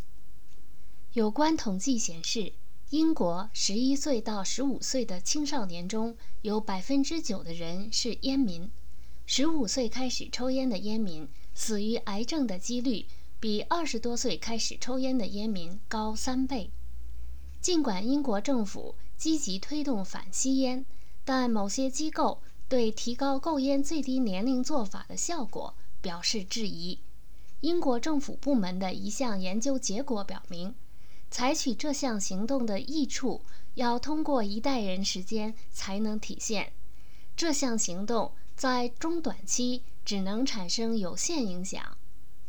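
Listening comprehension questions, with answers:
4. 需要多长时间人们才能看到这项新政策带来的好处?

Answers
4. 一代人的时间

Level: 3rd Year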